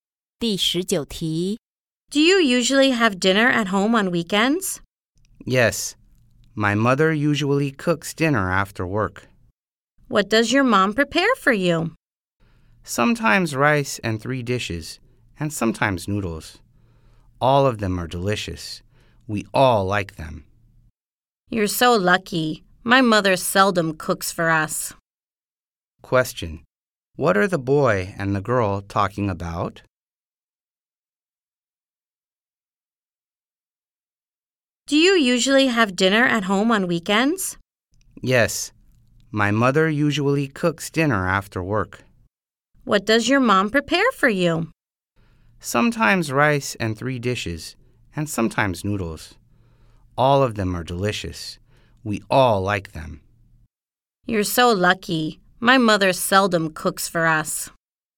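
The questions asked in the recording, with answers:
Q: What are the boy and the girl talking about?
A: Dinner their mothers cook at home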